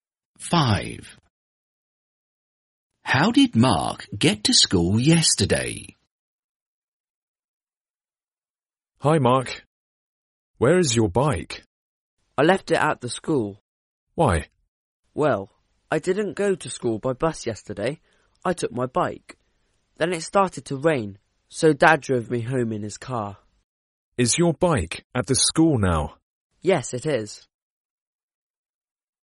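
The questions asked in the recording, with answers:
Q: How did Mark get to school yesterday?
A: by bike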